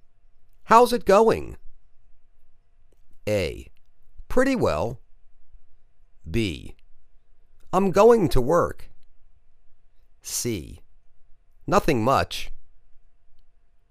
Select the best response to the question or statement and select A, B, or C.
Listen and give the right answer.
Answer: Pretty well